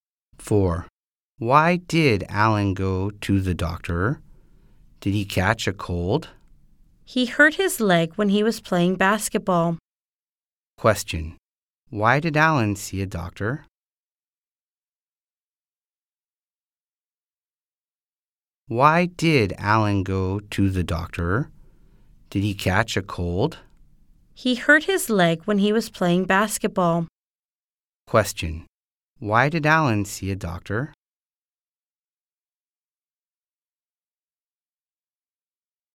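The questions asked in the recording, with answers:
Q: Why did Alan see a doctor?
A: He hurt his leg playing basketball.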